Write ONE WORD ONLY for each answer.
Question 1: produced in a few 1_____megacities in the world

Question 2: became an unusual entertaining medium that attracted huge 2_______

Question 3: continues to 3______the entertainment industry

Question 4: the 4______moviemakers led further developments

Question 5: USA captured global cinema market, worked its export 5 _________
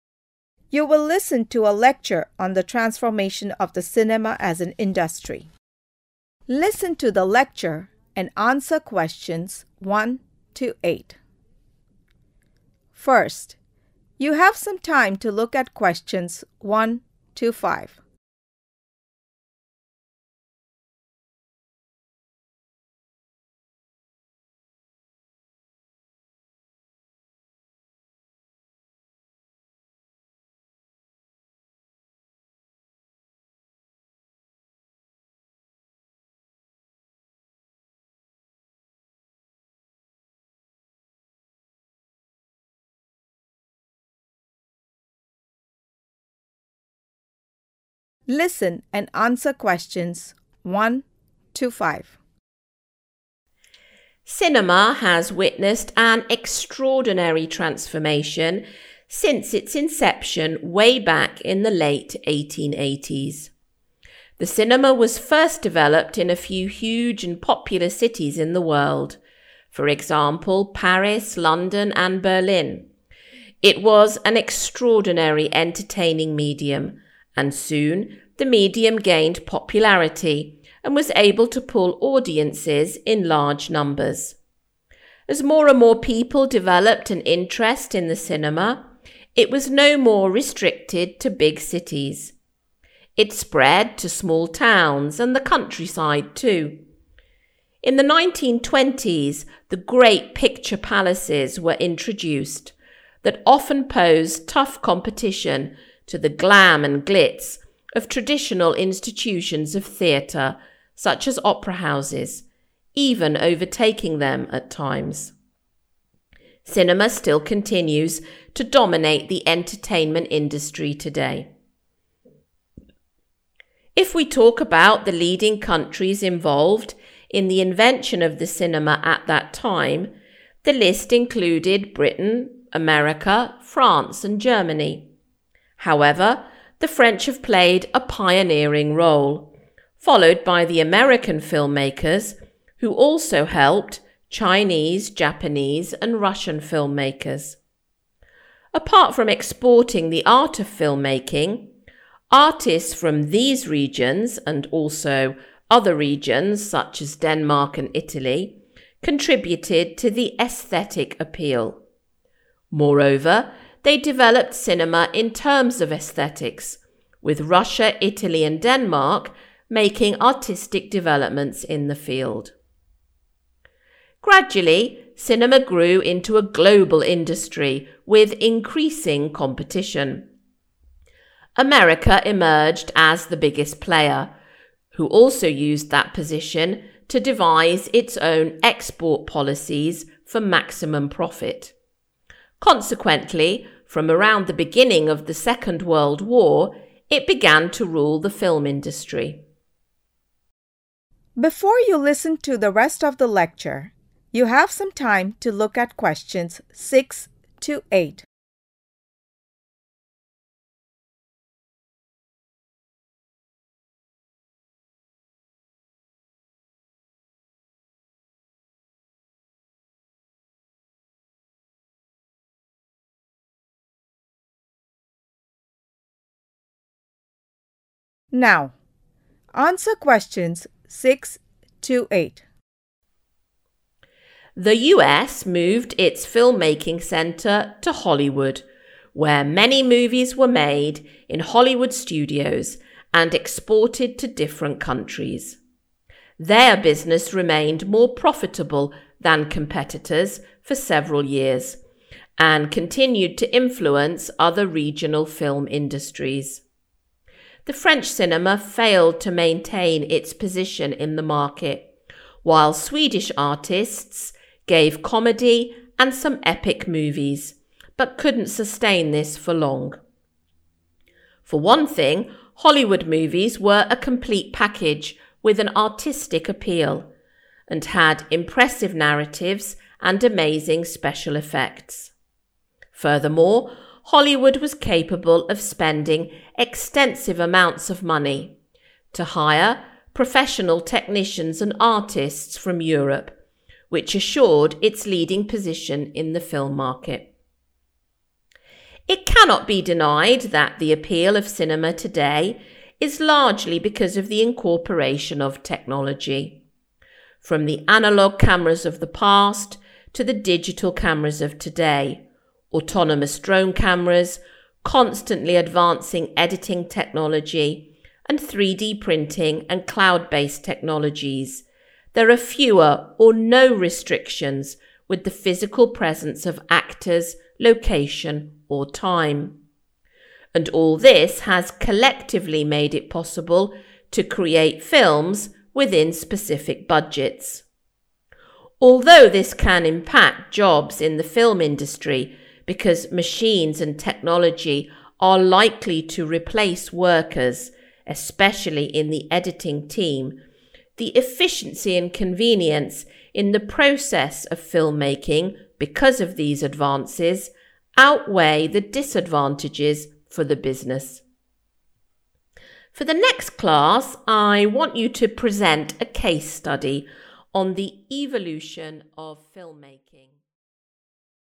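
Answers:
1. popular
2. audiences
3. dominate
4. French
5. policies

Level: Beginner's Lessons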